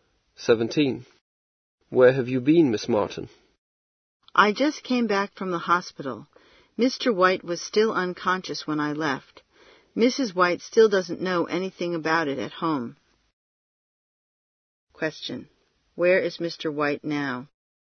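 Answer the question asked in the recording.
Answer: In the hospital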